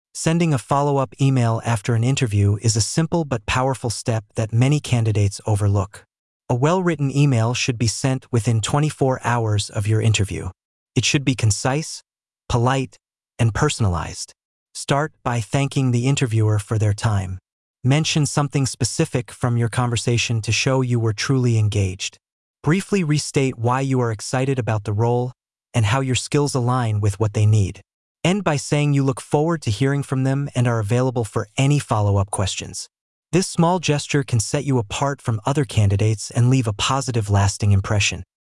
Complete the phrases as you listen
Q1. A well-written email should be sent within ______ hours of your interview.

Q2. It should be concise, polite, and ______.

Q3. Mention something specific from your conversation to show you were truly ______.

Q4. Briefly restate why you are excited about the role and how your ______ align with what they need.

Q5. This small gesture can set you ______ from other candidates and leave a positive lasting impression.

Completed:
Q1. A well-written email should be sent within 24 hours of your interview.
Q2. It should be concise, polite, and personalized.
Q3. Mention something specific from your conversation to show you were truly engaged.
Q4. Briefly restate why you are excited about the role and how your skills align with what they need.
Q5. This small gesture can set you apart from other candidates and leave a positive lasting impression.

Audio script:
Sending a follow-up email after an interview is a simple but powerful step that many candidates overlook. A well-written email should be sent within 24 hours of your interview. It should be concise, polite, and personalized. Start by thanking the interviewer for their time. Mention something specific from your conversation to show you were truly engaged. Briefly restate why you are excited about the role and how your skills align with what they need. End by saying you look forward to hearing from them and are available for any follow-up questions.
"This small gesture can set you apart from other candidates and leave a positive lasting impression."